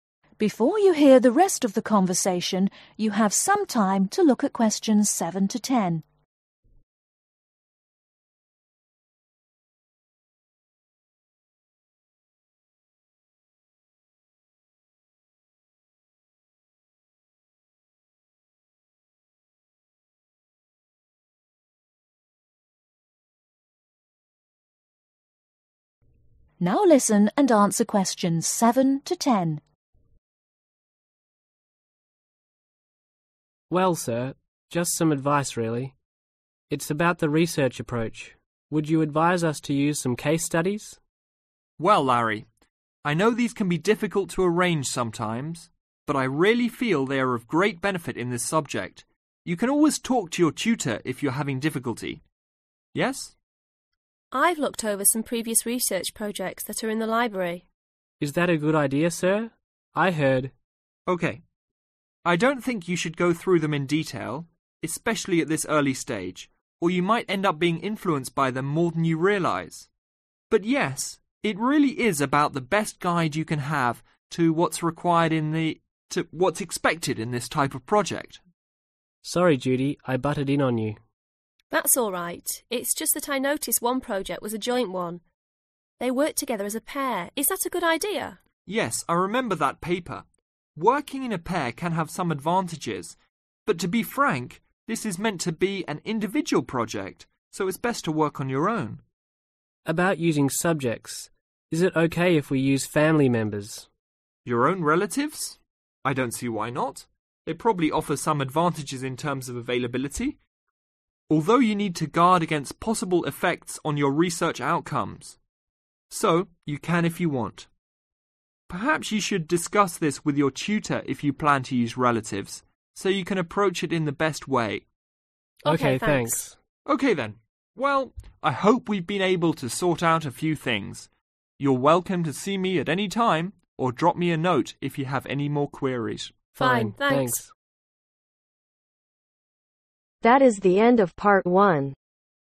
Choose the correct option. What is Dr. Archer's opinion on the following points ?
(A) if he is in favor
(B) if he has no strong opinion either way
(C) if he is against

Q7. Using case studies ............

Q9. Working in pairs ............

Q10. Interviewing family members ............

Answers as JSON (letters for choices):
{"7": "A", "9": "C", "10": "B"}